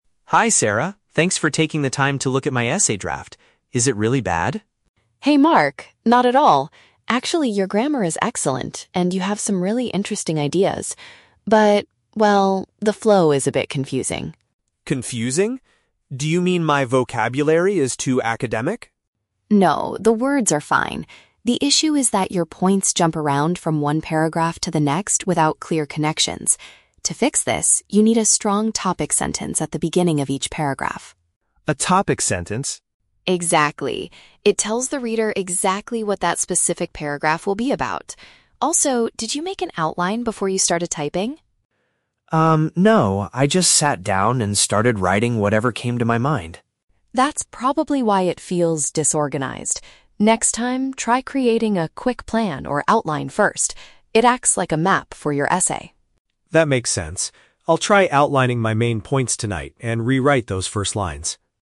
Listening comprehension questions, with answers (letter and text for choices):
Listen to the conversation between a student and a peer tutor, and choose the correct answer (A, B, or C) for each question.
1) What does Sarah think is the main problem with Mark's essay?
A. The vocabulary is too difficult to understand.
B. There are too many basic grammar mistakes.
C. The ideas are not connected logically.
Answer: C. The ideas are not connected logically.

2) What does Sarah suggest Mark should put at the start of every paragraph?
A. A statement introducing the main idea.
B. A complex academic word.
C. A brief summary of the whole essay.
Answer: A. A statement introducing the main idea.

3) According to the conversation, why did Mark's essay become disorganized?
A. He forgot to check his spelling before submitting it.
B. He began writing without making a structured plan.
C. He lost the physical map he was using for his research.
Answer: B. He began writing without making a structured plan.

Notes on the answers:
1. Sarah says, "your points jump around from one paragraph to the next without clear connections." Option C perfectly paraphrases this as the ideas not being logically connected. Option A is a trap; Mark asks if his vocabulary is too academic, but Sarah says, "No, the words are fine." Option B is a trap; Sarah actually praises his grammar, saying it is "excellent."
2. Sarah tells Mark he needs a "topic sentence" and explains that it "tells the reader exactly what that specific paragraph will be about." Option A paraphrases this definition. Option B is a trap because the word "academic" is mentioned but rejected. Option C is plausible for a conclusion paragraph, but it is not mentioned in the audio.
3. When Sarah asks if he made an outline, Mark admits, "no. I just sat down and started writing." Option B paraphrases this as writing without a structured plan. Option A is not mentioned. Option C is a trap; Sarah compares an outline to a "map" for his essay, but he didn't literally lose a map.

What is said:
Mark: Hi, Sarah. Thanks for taking the time to look at my essay draft. Is it really bad?
Sarah: Hey, Mark. Not at all! Actually, your grammar is excellent, and you have some really interesting ideas. But... well, the flow is a bit confusing.
Mark: Confusing? Do you mean my vocabulary is too academic?
Sarah: No, the words are fine. The issue is that your points jump around from one paragraph to the next without clear connections. To fix this, you need a strong topic sentence at the beginning of each paragraph.
Mark: A topic sentence?
Sarah: Exactly. It tells the reader exactly what that specific paragraph will be about. Also, did you make an outline before you started typing?
Mark: Um, no. I just sat down and started writing whatever came to my mind.
Sarah: That's probably why it feels disorganized. Next time, try creating a quick plan or outline first. It acts like a map for your essay.
Mark: That makes sense. I'll try outlining my main points tonight and rewrite those first lines.